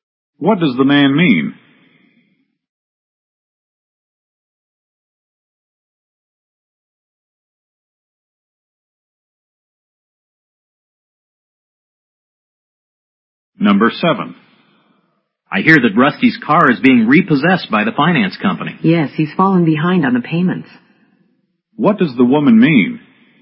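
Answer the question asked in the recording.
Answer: Rusty hasn't kept up with his car payments.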